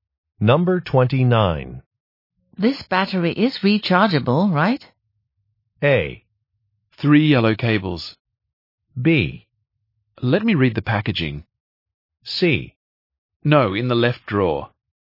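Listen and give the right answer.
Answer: B: Let me read the packaging.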